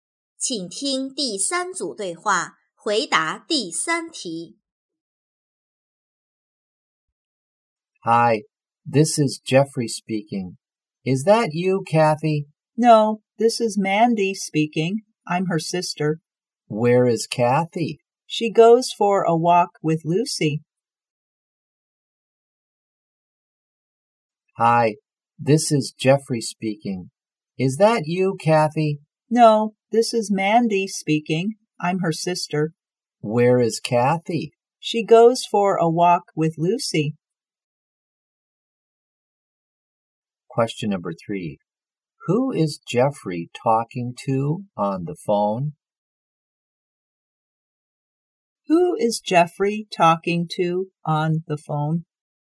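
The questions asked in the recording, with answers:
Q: Who is Jeffrey talking to on the phone?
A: Mandy, Kathy's sister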